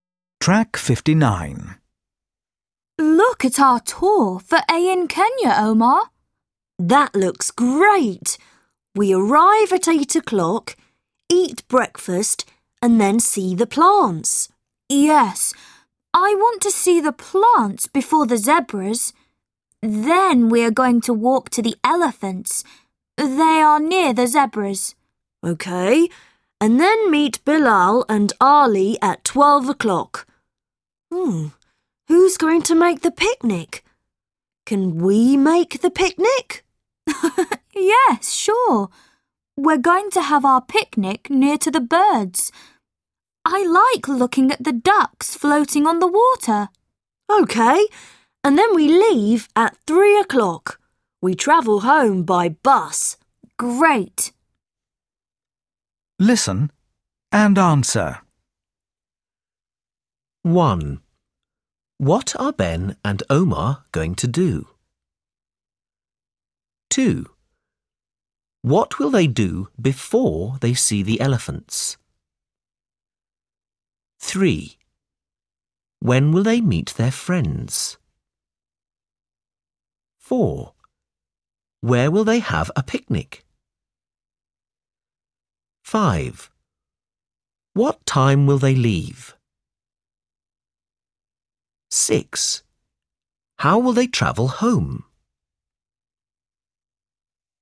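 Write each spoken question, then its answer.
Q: What will they do before they see the elephants?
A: Eat breakfast, see the plants and the zebras

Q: When will they meet their friends?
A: At 12 o'clock

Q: Where will they have a picnic?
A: Near the birds

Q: What time will they leave?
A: At 3 o'clock

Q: How will they travel home?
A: By bus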